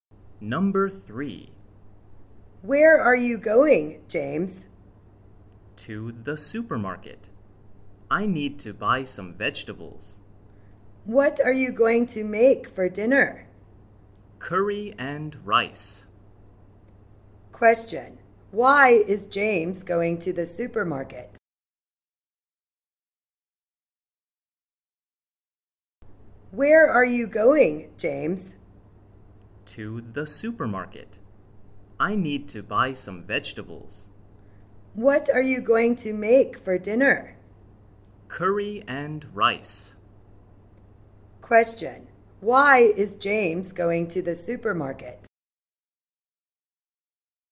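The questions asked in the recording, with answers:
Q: Why is James going to the supermarket?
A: To buy some vegetables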